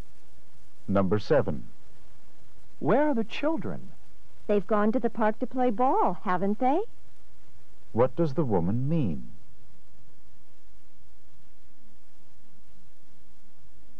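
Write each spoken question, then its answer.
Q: What does the woman mean?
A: She thinks they went to the park but isn't sure.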